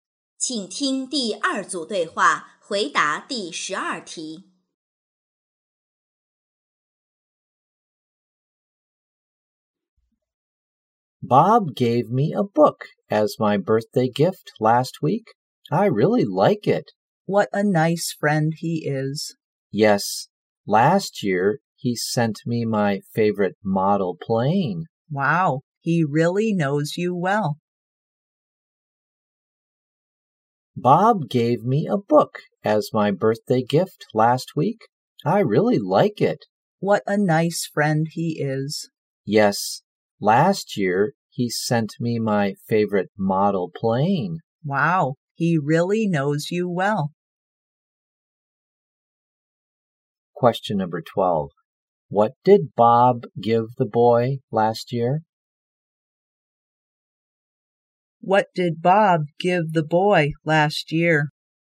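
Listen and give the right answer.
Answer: A model plane.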